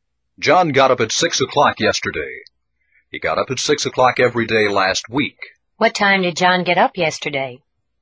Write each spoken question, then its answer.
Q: What time did John get up yesterday?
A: At 6 o'clock. He got up at 6 o'clock.